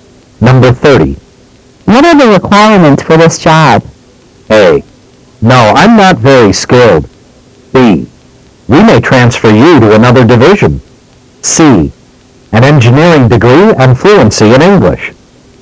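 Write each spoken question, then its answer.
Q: What are the requirements for this job?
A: C: An engineering degree and fluency in English.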